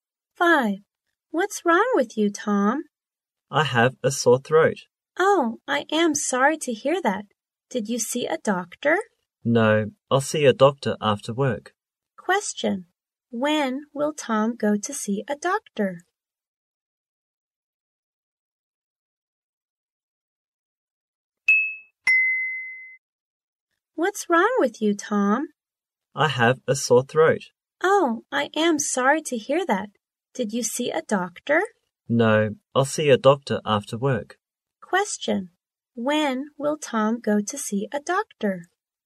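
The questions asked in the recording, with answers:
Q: When will Tom go to see a doctor?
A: After work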